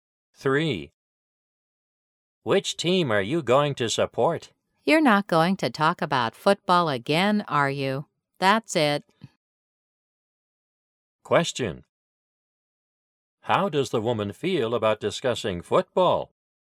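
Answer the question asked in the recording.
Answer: She is tired of it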